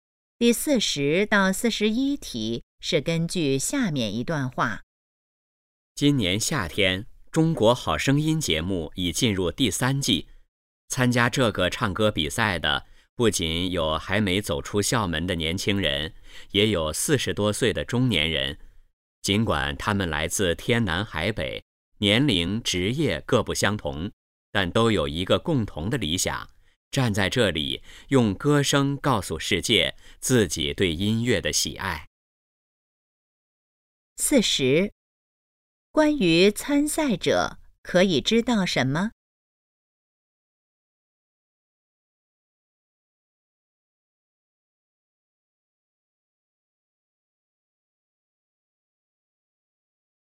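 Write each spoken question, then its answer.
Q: 那些人参赛的共同原因是什么?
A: 热爱音乐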